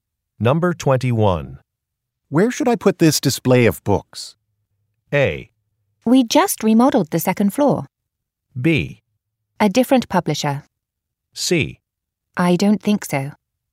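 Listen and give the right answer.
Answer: A: We just remodeled the second floor.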